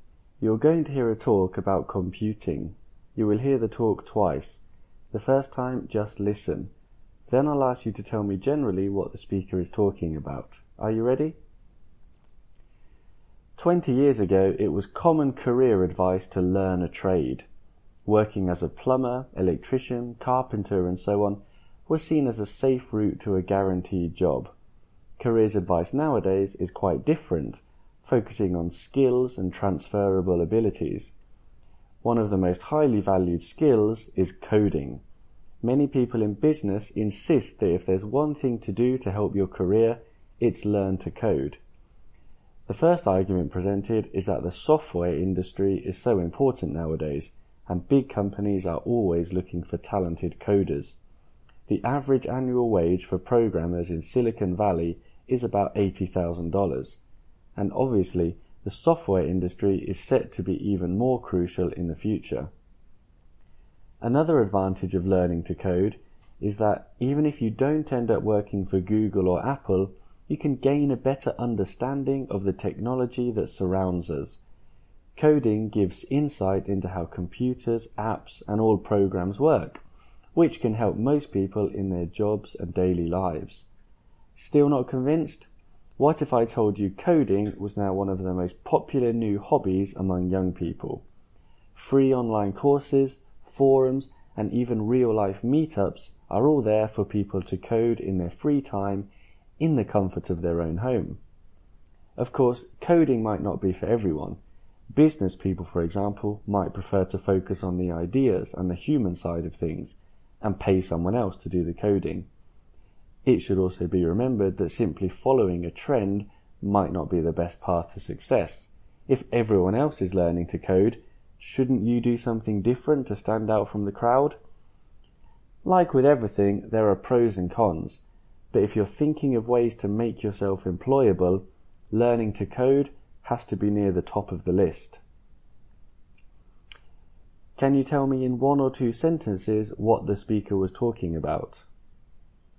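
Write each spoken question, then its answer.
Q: Can you tell me in one or two sentences what the speaker was talking about?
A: The advantages and disadvantages of learning to code for your career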